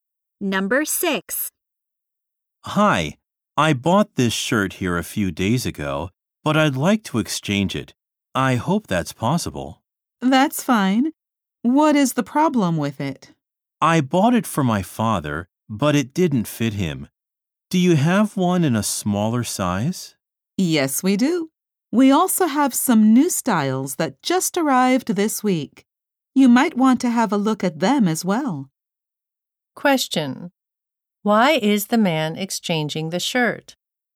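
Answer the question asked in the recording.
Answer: It didn't fit his father.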